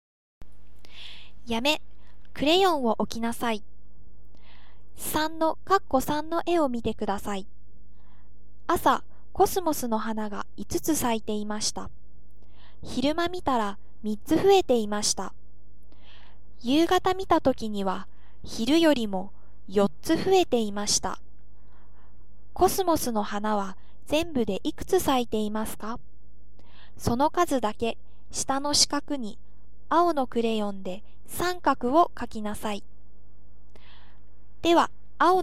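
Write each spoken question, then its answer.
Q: コスモスの花は全部でいくつ咲いていますか?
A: 12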